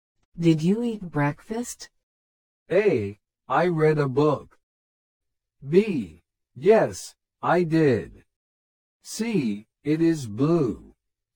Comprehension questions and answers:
Did you eat breakfast?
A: Yes, I did.

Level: 初級者用